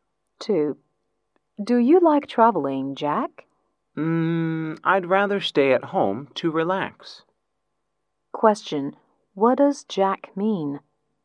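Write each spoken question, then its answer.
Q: Question, what does Jack mean?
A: He doesn't like traveling; he'd rather stay at home to relax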